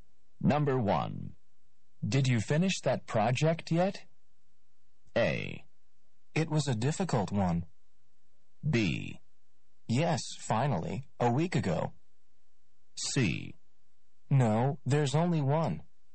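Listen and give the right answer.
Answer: B: Yes, finally, a week ago.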